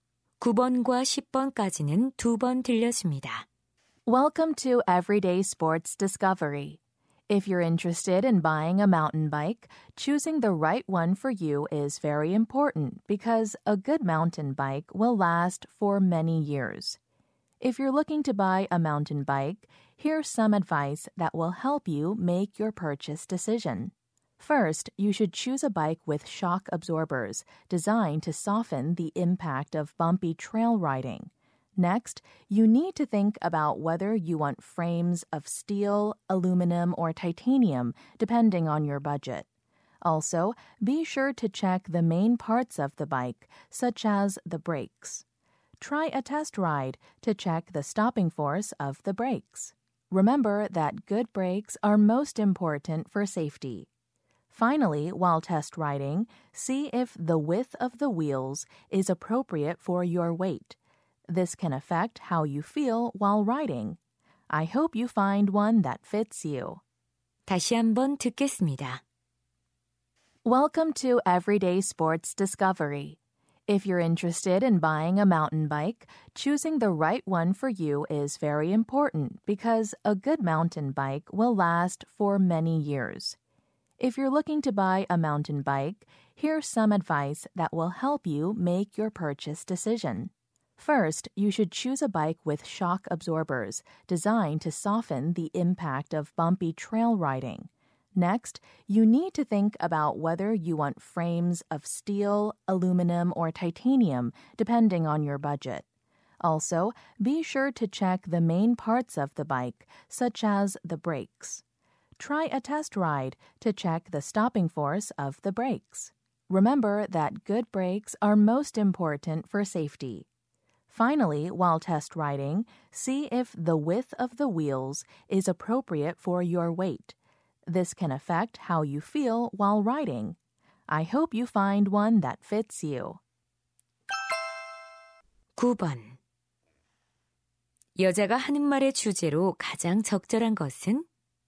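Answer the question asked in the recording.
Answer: 산악자전거를 고르는 방법에 대한 조언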